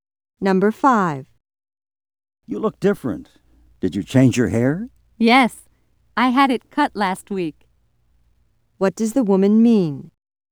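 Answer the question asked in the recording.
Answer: She got a haircut last week.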